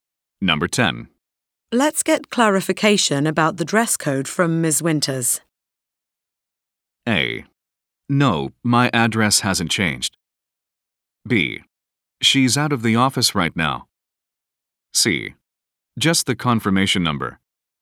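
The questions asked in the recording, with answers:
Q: Let's get clarification about the dress code from Ms.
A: B: She's out of the office right now.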